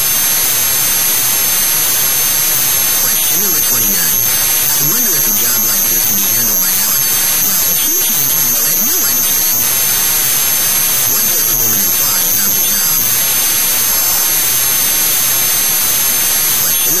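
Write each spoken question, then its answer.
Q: What does the woman imply about the job?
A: If Alex can't handle it, no one can.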